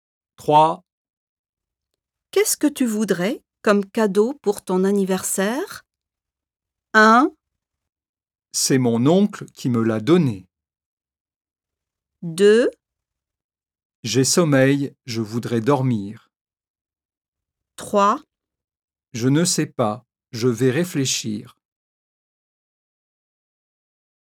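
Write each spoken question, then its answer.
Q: Qu'est-ce que tu voudrais comme cadeau pour ton anniversaire?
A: 3: Je ne sais pas, je vais réfléchir.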